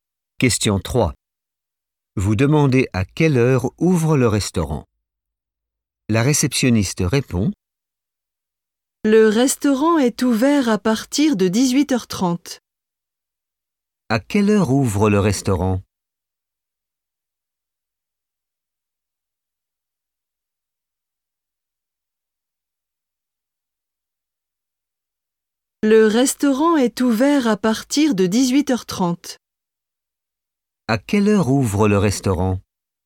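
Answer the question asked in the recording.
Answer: à 18h30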